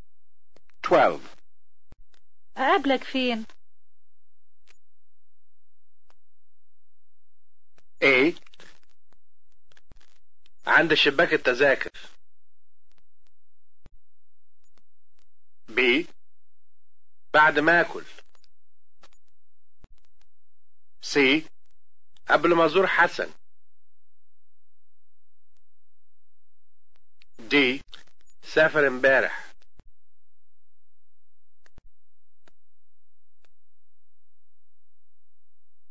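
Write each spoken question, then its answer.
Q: أقابلك فين؟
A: A: عند شباك التذاكر.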